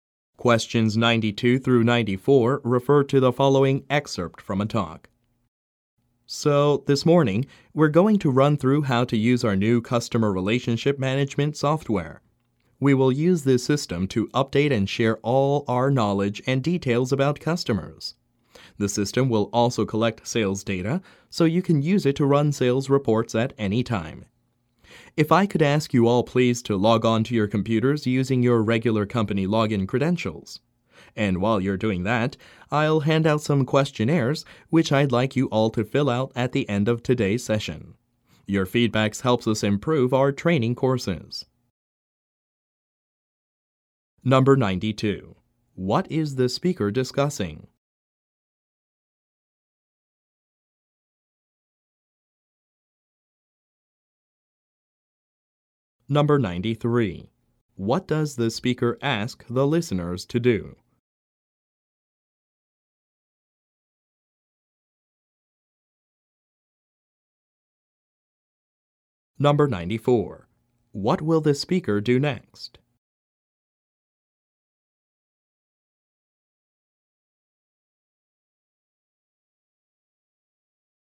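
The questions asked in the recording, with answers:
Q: What is the speaker discussing?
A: How to use new customer relationship management software

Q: What does the speaker ask the listeners to do?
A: Log on to their computers

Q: What will the speaker do next?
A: Hand out questionnaires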